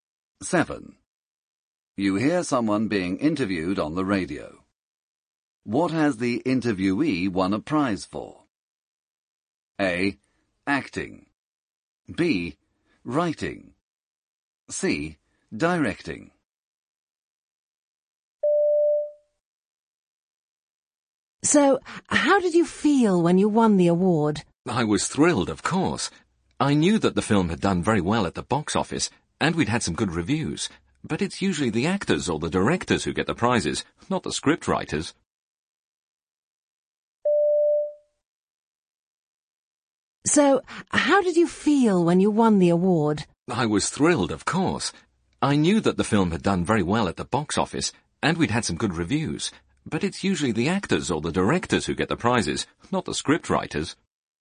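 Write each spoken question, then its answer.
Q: What has the interviewee won a prize for?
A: B: Writing.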